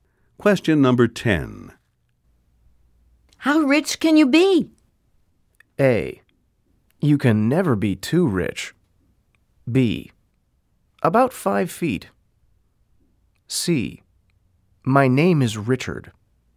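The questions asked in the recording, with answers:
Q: How rich can you be?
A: A: You can never be too rich.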